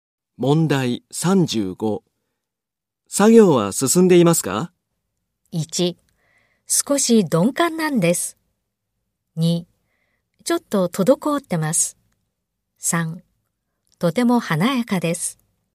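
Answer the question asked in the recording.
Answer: 2: ちょっと滞ってます。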